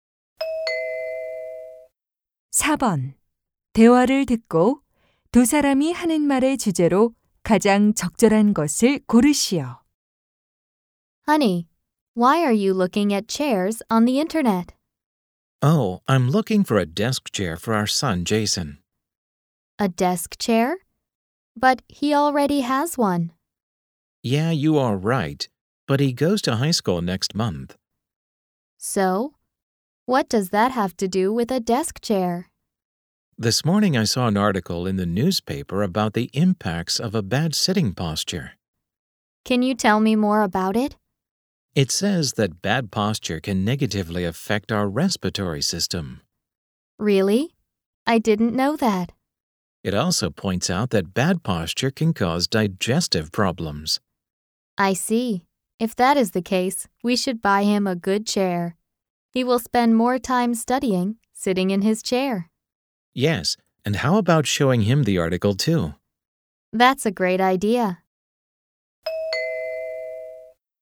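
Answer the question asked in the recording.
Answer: 나쁜 앉은 자세가 건강에 미치는 영향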